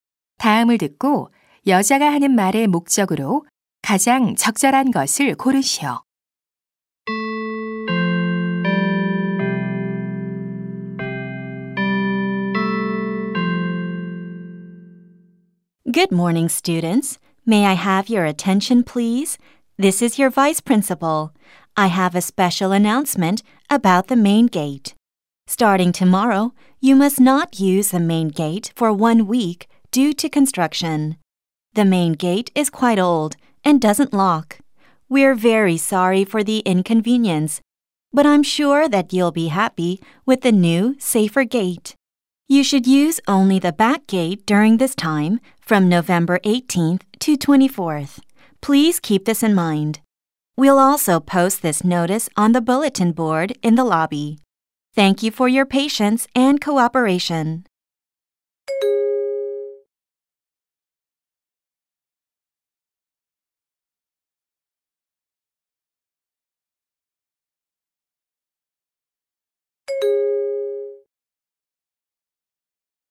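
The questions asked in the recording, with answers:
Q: 다음을 듣고 여자가 하는 말의 목적으로 가장 적절한 것을 고르시오.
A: 공사로 인해 정문 사용이 일주일간 금지됨을 알리려고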